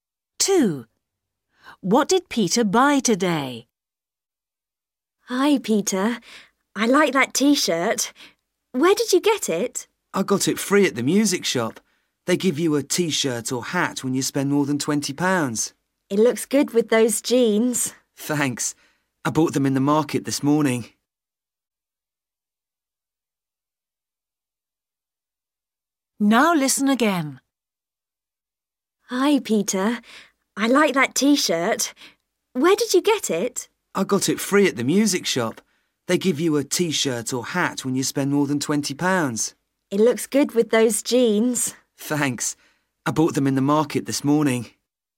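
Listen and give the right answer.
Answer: Jeans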